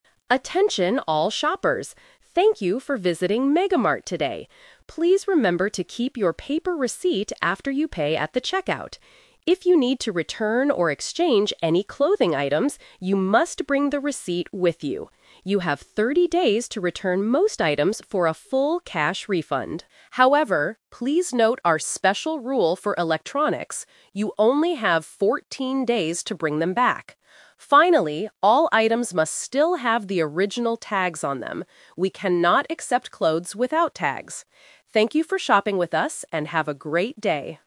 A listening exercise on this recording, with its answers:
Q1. What must customers keep if they want to return an item?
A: Their paper receipt.

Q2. How many days do customers have to return electronics?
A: 14 days.

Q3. What is the rule about the item's tags?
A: They must still be on the items.

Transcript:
Store Announcement: Attention all shoppers. Thank you for visiting MegaMart today. Please remember to keep your paper receipt after you pay at the checkout. If you need to return or exchange any clothing items, you must bring the receipt with you. You have 30 days to return most items for a full cash refund. However, please note our special rule for electronics: you only have 14 days to bring them back. Finally, all items must still have the original tags on them. We cannot accept clothes without tags. Thank you for shopping with us, and have a great day!